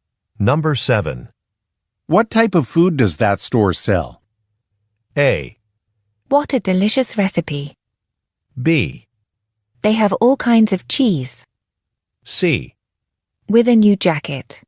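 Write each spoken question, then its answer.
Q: What type of food does that store sell?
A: B: They have all kinds of cheese.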